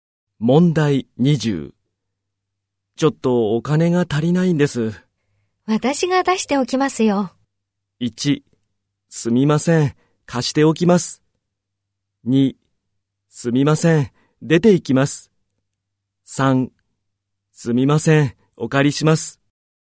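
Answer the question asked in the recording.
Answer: 3: すみません、お借りします。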